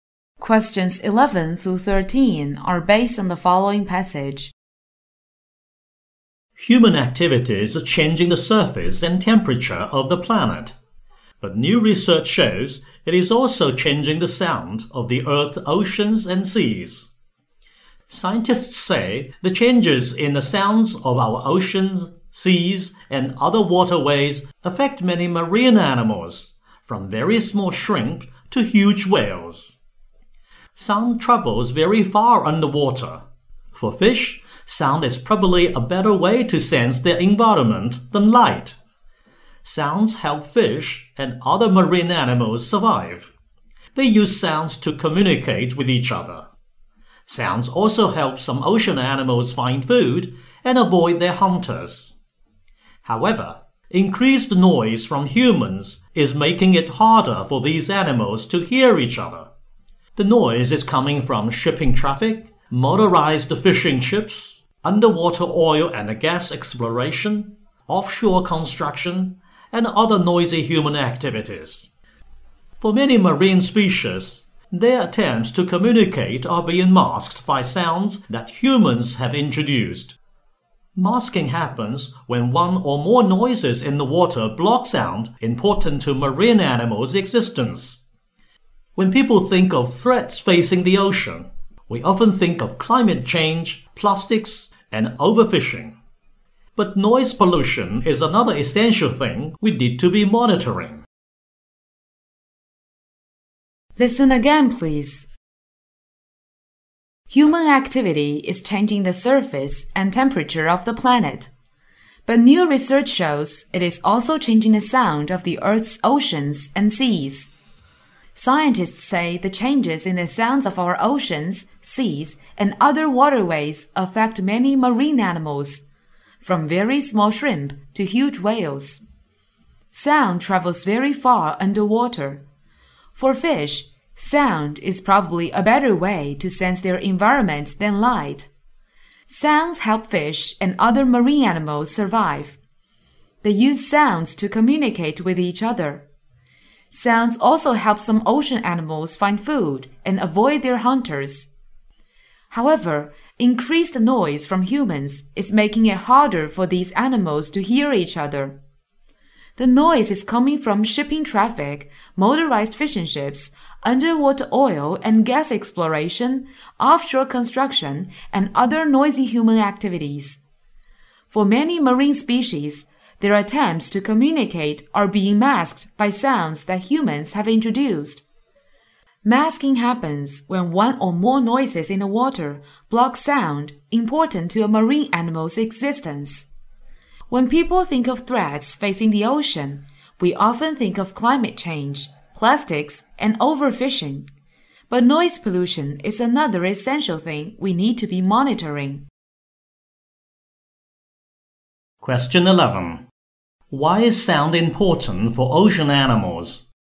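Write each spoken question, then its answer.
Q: Why is sound important for ocean animals?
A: It helps them communicate, find food and avoid hunters, so they can survive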